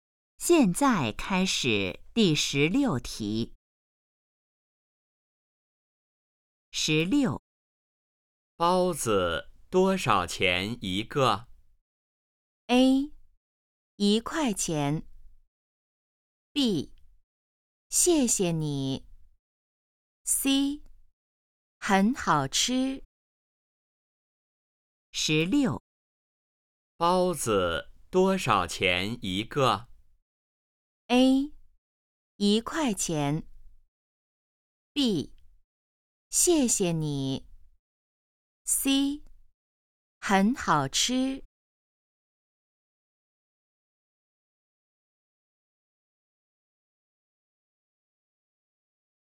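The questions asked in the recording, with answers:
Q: 包子多少钱一个?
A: A: 一块钱。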